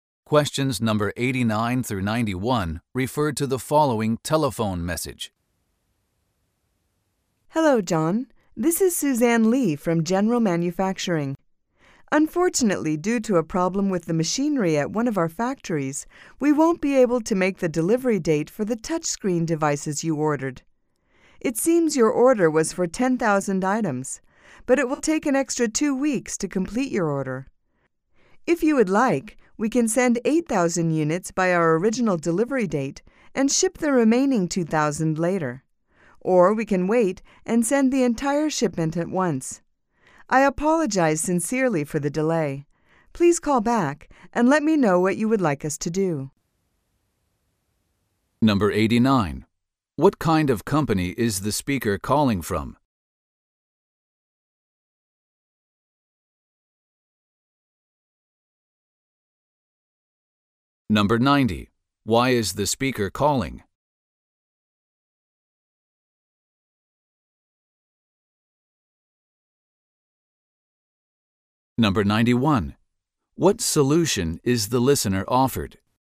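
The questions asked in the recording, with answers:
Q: What kind of company is the speaker calling from?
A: A manufacturing company

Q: Why is the speaker calling?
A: To report that an order will be delayed because of a machinery problem

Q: What solution is the listener offered?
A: Get 8,000 units on the original date and the remaining 2,000 later, or wait for the whole shipment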